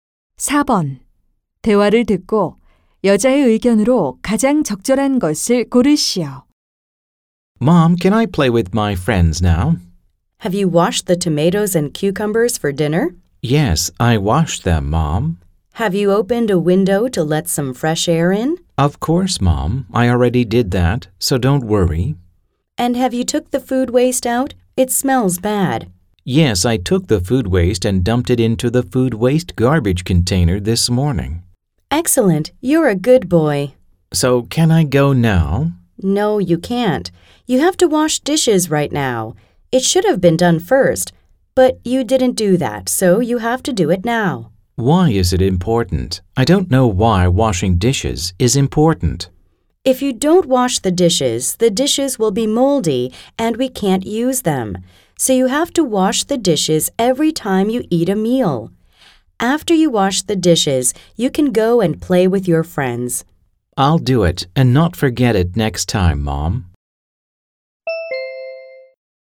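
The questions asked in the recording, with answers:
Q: 대화를 듣고 여자의 의견으로 가장 적절한 것을 고르시오.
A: 식사 후에는 매번 설거지를 해야 한다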